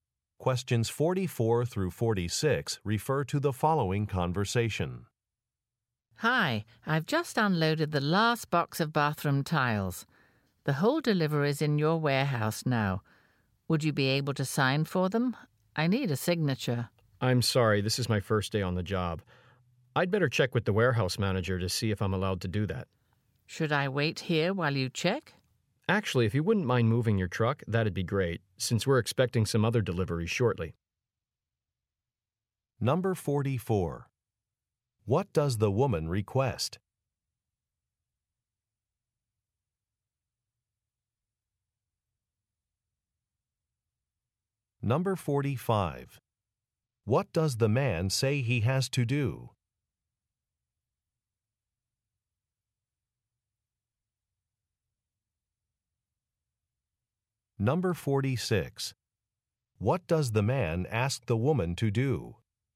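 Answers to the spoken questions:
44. A signature for the delivery
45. Check with the warehouse manager
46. Move her truck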